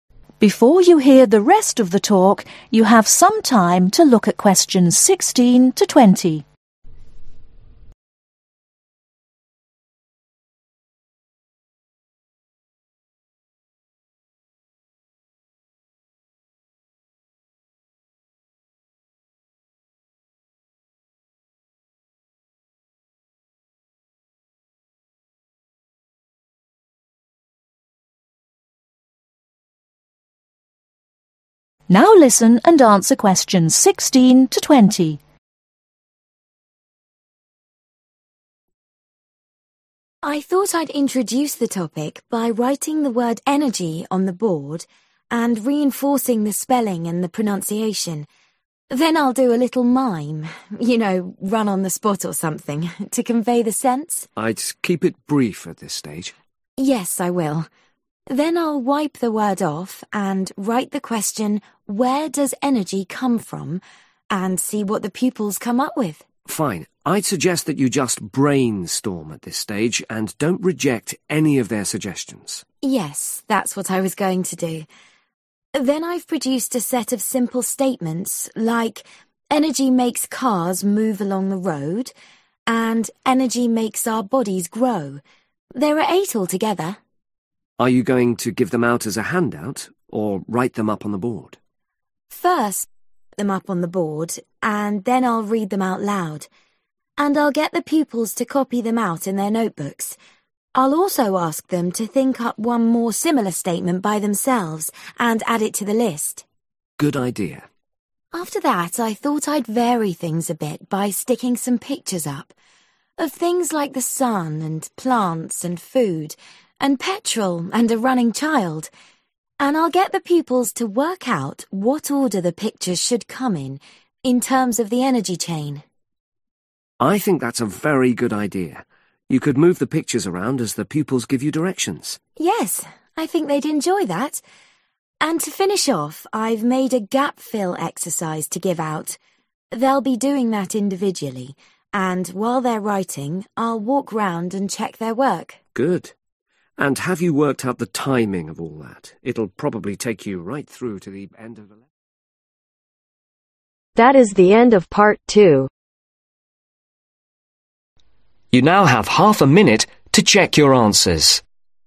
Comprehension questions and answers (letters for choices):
Complete the flow chart below. Choose FIVE answers from the box and write the correct letter, A-G next to questions 16-20.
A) identify sequence.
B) Ask questions.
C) Copy.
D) Demonstrate meaning.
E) Distribute worksheet.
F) Draw pictures.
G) Present sentences.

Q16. Teacher: (16)............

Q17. Teacher: (17)............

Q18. Pupils: (18)............ and expand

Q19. Pupils: (19)............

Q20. Teacher: (20)............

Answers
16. D
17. G
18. C
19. A
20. E